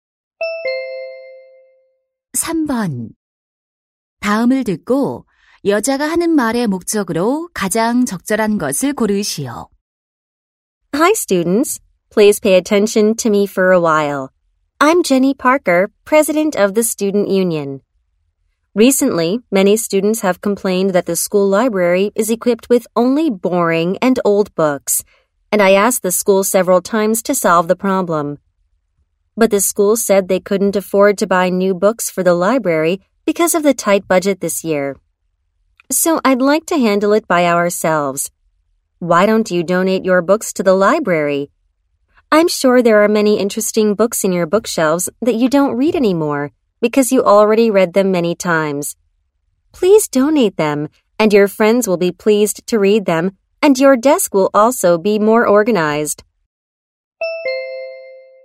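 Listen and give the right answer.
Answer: 학교 도서관에 책 기증을 요청하려고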